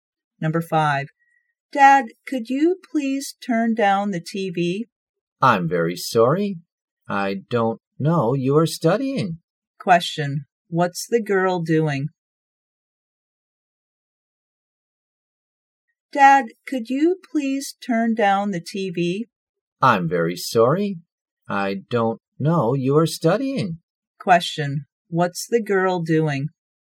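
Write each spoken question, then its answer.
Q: what's the girl doing?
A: Studying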